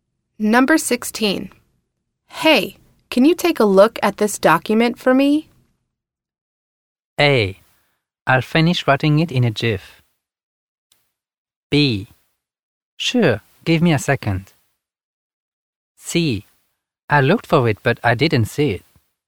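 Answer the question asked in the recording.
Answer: B: Sure, give me a second.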